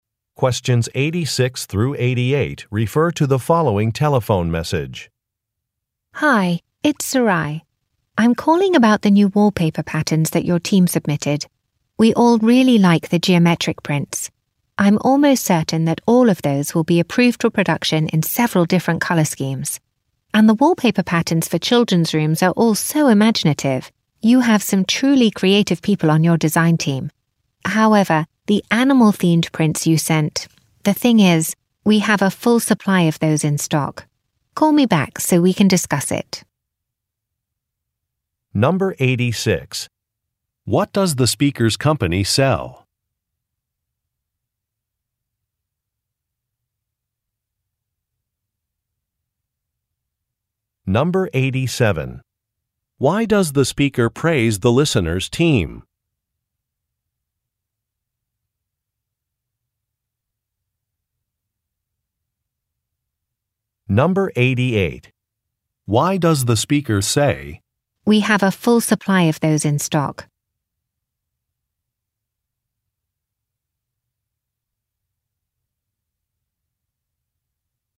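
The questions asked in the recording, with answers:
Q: What does the speaker's company sell?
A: Wallpaper

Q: Why does the speaker praise the listener's team?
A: They are very creative (imaginative designs)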